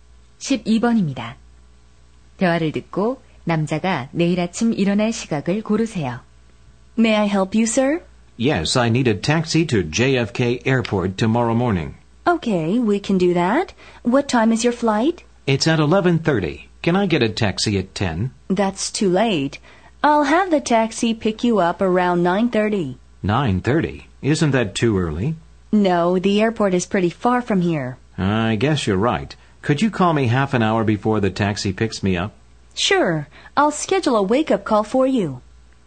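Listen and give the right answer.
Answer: 9시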